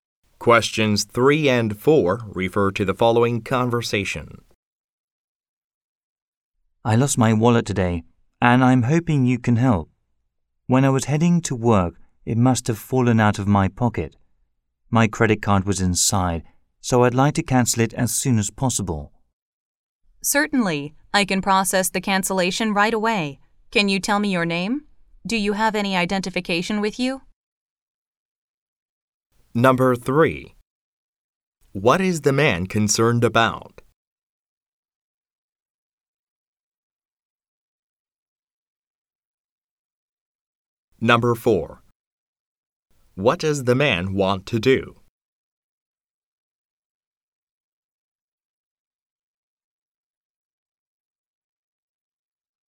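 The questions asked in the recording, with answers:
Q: What is the man concerned about?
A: He lost his wallet, which had his credit card in it

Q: What does the man want to do?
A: Cancel his credit card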